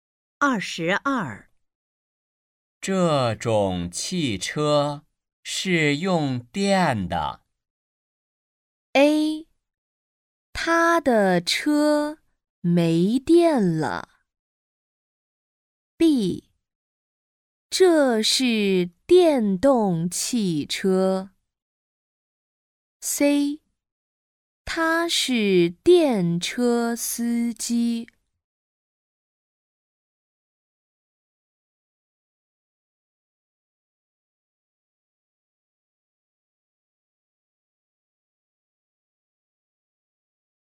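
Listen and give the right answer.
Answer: B: 这是电动汽车。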